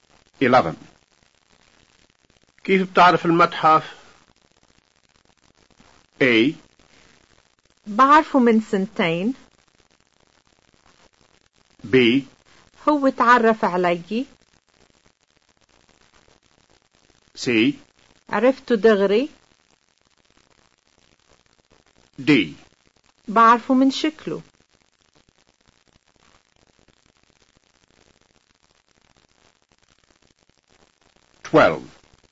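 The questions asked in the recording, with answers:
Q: كيف بتعرف المتحف؟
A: D: بعرفه من شكله.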